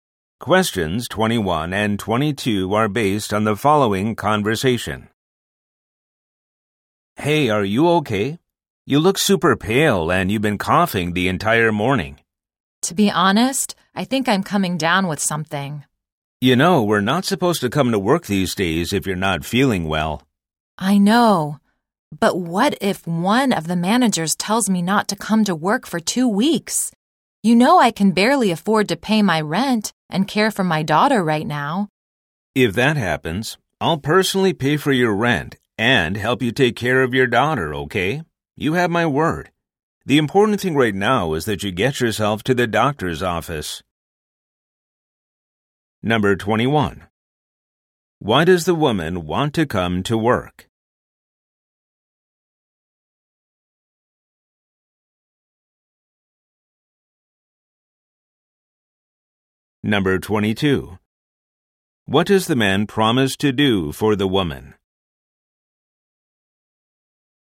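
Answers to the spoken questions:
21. She can barely afford her rent and care for her daughter
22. Pay her rent and help take care of her daughter if she's told to stay home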